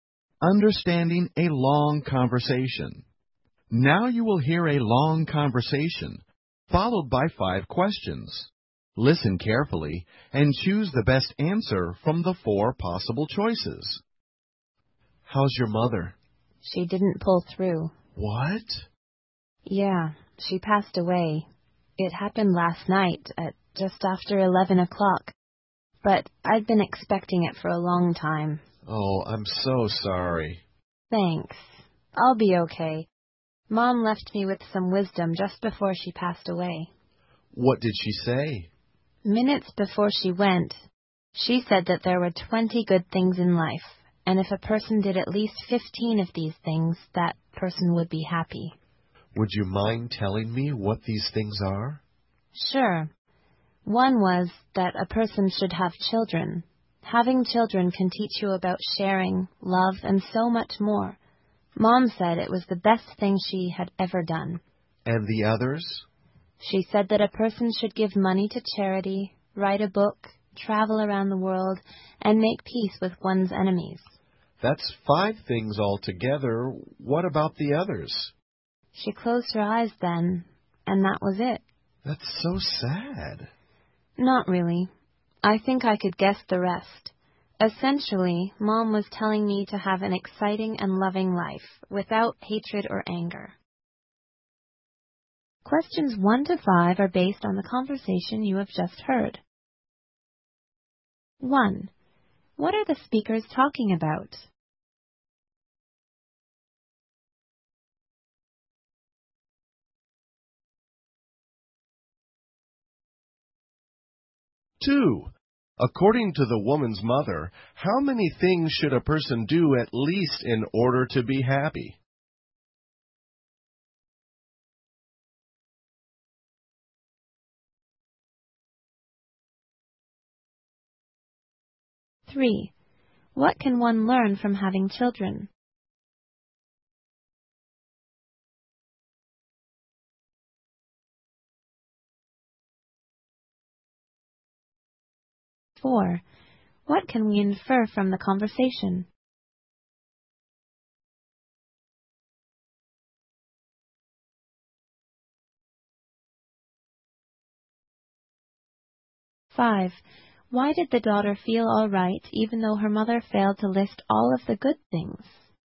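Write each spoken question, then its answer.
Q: What are the speakers talking about?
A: The death of the woman's mother and the advice she left.

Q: According to the woman's mother, how many things should a person do at least in order to be happy?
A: 15

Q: What can one learn from having children?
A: Sharing and love.

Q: Why did the daughter feel all right even though her mother failed to list all of the good things?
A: She thought she could guess the rest.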